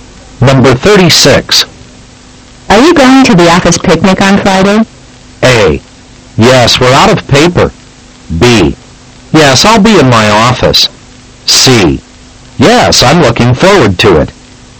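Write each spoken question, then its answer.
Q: Are you going to the office picnic on Friday?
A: C: Yes, I'm looking forward to it.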